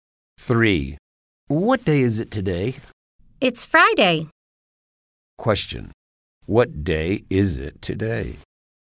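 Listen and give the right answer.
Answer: Friday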